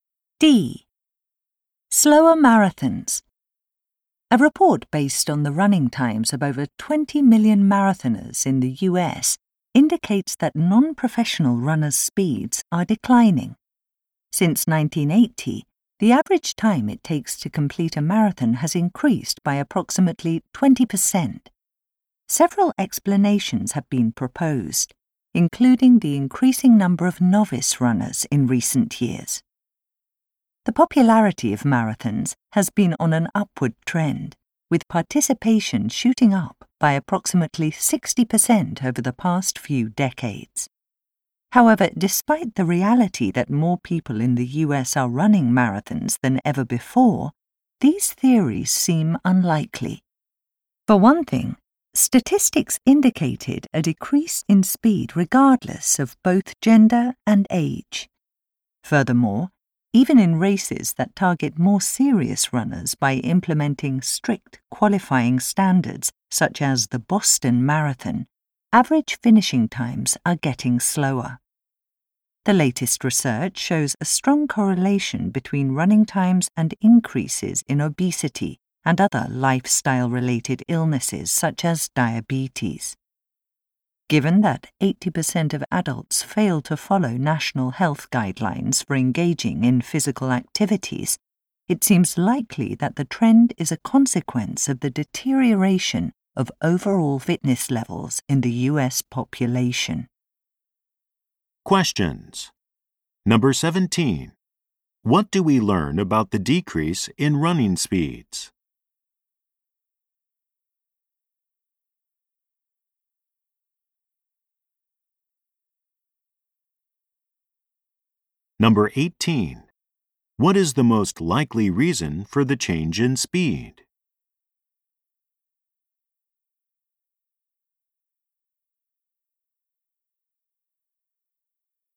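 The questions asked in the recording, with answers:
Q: What do we learn about the decrease in running speeds?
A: It happened regardless of gender and age, even in races for serious runners.

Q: What is the most likely reason for the change in speed?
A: Overall fitness levels in the US population have declined.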